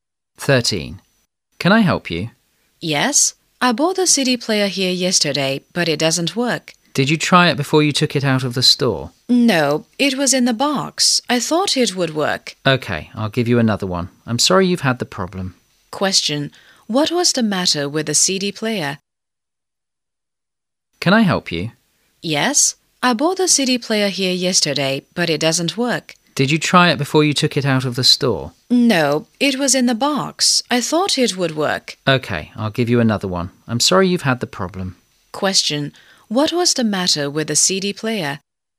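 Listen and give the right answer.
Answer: It didn't work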